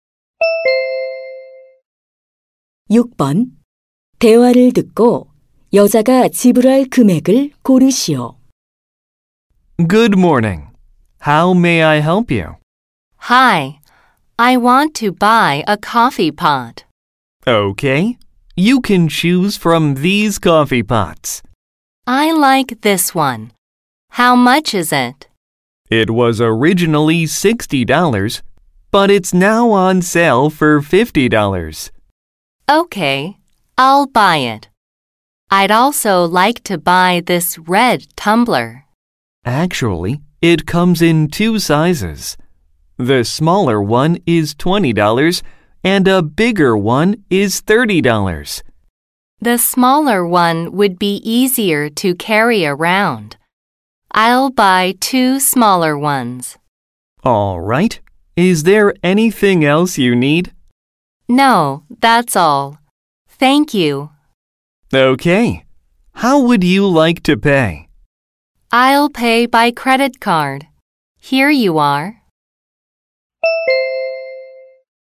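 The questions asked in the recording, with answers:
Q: 대화를 듣고 여자가 지불할 금액을 고르시오.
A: $90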